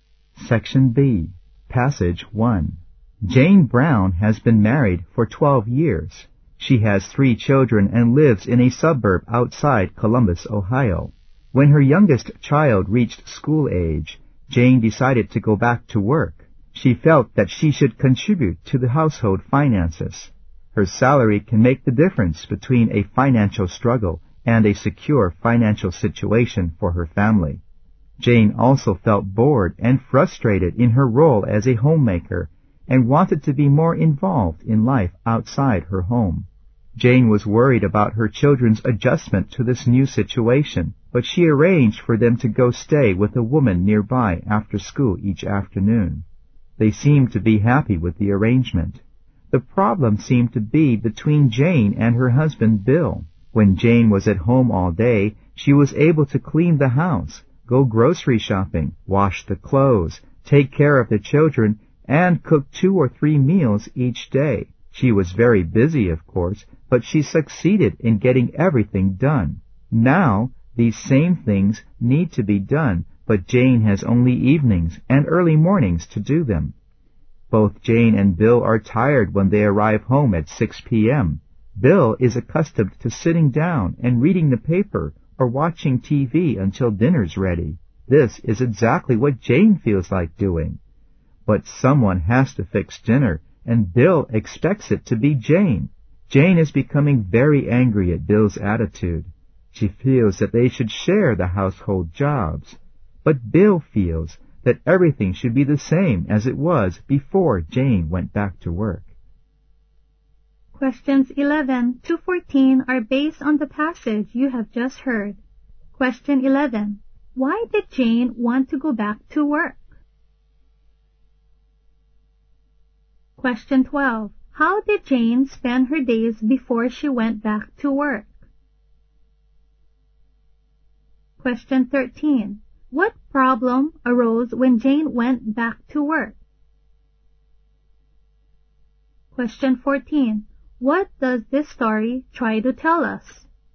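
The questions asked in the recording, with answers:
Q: Why did Jane want to go back to work?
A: To help with the family's finances and because she was bored and frustrated as a homemaker

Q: How did Jane spend her days before she went back to work?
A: Doing housework and taking care of the children

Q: What problem arose when Jane went back to work?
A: Bill would not share the household jobs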